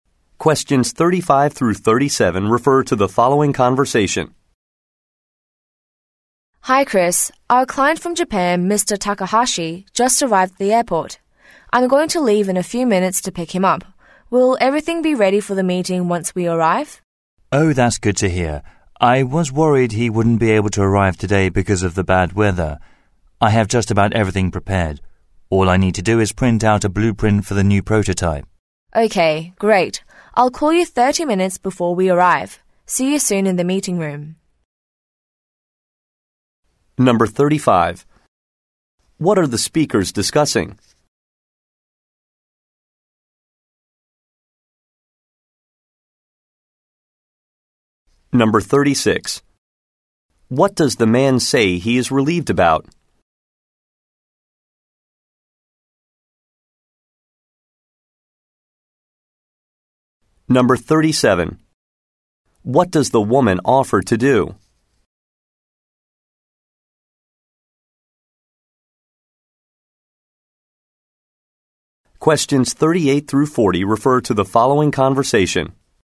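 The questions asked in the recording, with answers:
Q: What are the speakers discussing?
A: Preparations for a meeting with a client from Japan

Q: What does the man say he is relieved about?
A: The client arrived despite the bad weather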